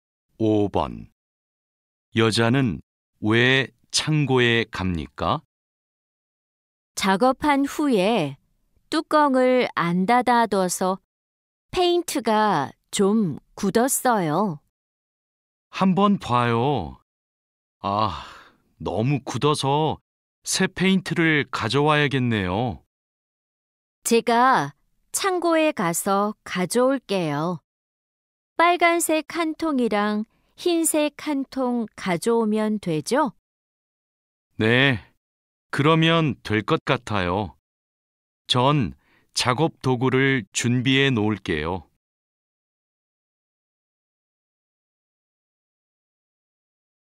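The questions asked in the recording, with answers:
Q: 여자는 왜 창고에 갑니까?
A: 페인트가 굳어서 새 페인트를 가져오려고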